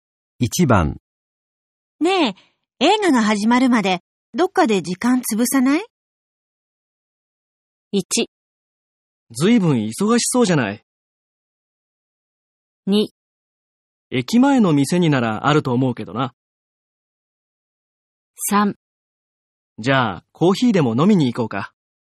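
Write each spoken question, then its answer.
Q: ねえ、映画が始まるまでどっかで時間潰さない?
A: 3: じゃあコーヒーでも飲みに行こうか。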